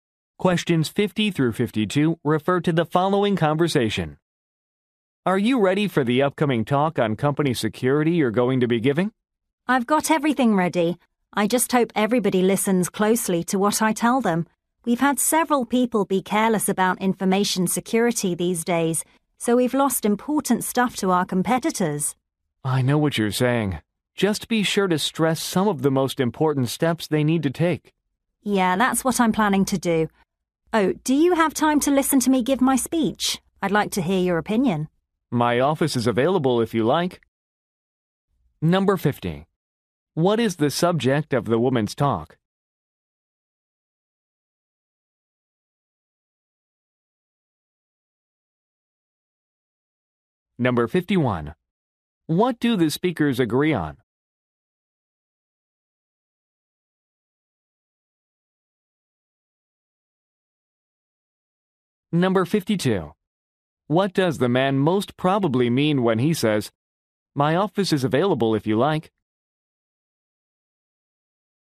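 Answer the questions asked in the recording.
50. Company information security
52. She can practice her speech in his office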